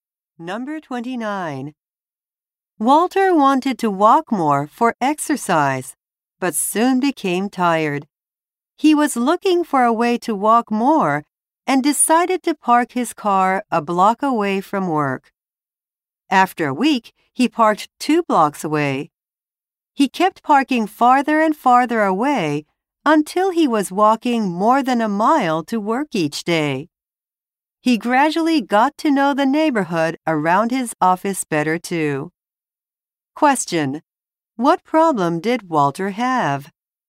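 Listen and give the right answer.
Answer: He soon became tired when walking.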